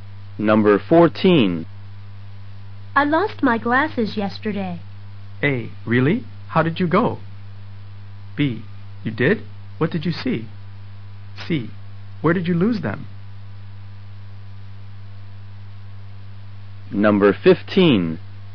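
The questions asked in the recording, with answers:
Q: I lost my glasses yesterday.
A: C: Where did you lose them?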